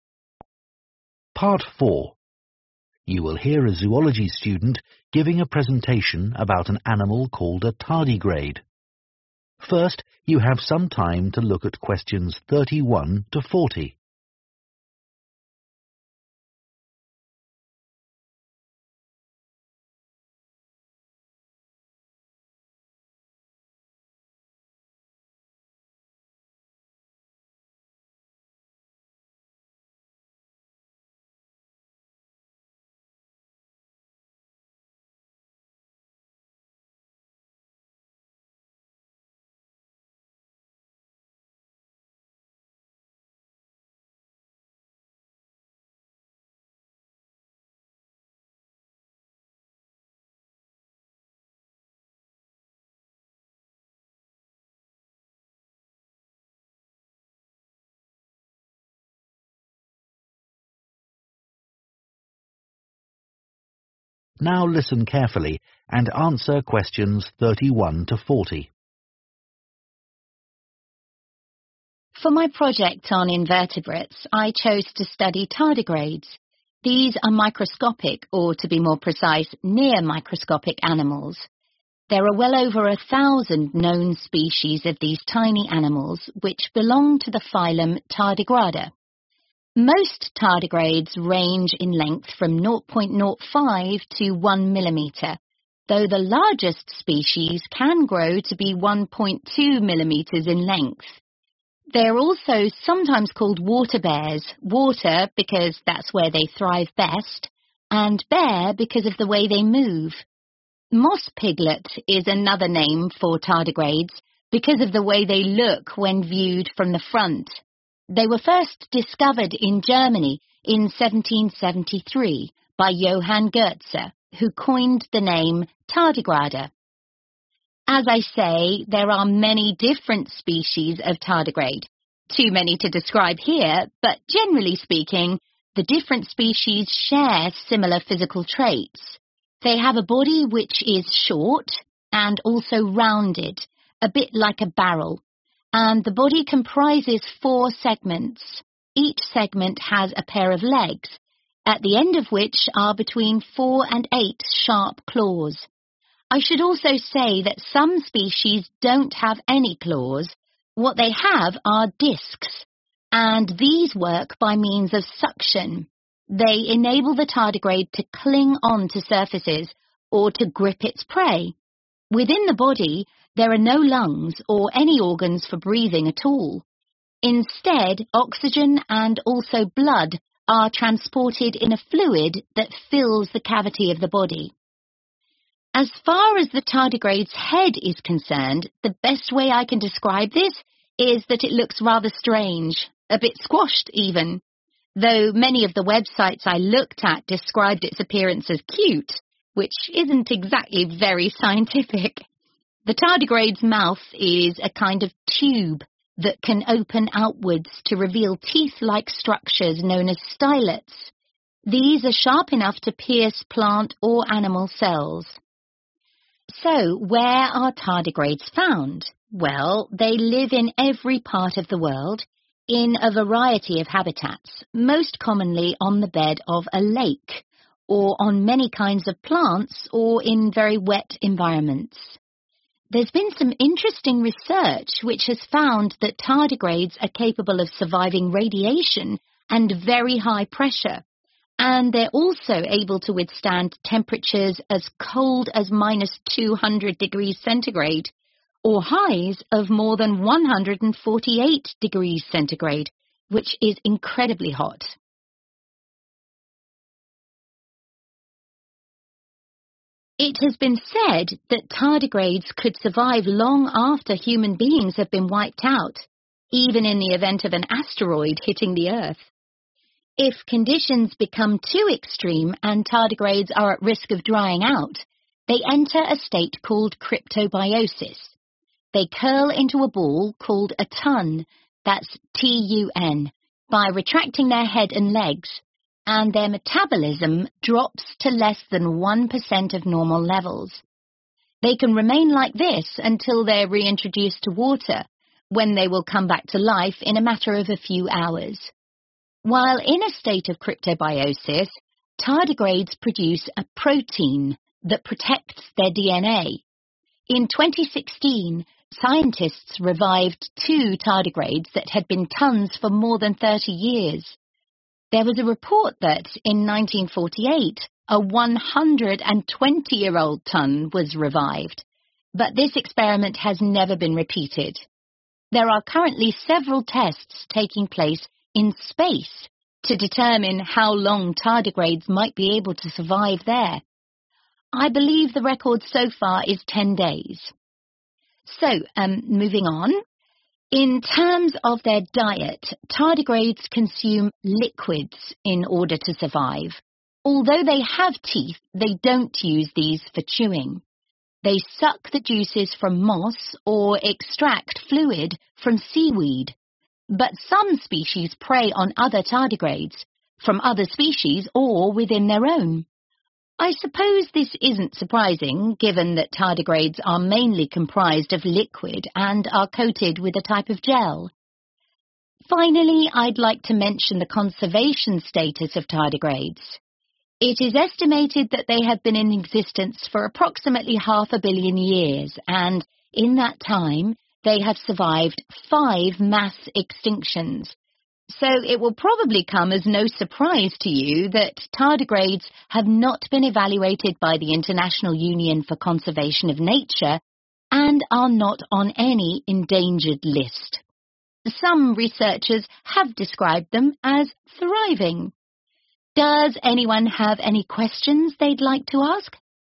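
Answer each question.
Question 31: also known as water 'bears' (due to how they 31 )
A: move

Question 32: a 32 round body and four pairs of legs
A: short

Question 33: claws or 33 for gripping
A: discs

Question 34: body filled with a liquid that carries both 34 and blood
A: oxygen

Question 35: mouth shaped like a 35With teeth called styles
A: tube

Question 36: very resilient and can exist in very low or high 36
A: temperatures

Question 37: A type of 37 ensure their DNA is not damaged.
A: protein

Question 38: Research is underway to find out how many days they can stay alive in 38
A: space

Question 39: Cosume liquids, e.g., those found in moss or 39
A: seaweed

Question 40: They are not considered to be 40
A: endangered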